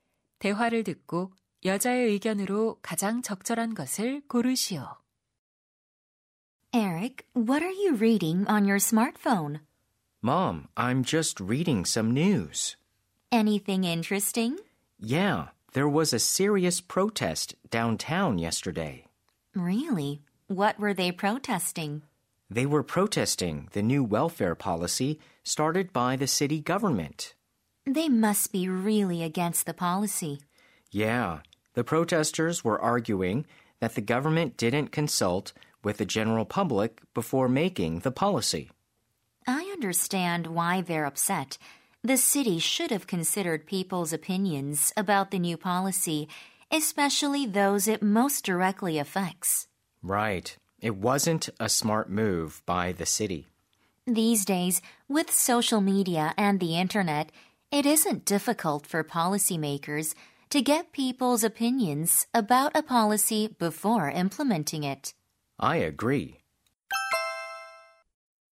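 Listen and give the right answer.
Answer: 정책 입안자는 정책 시행 전에 시민의 의견을 들어야 한다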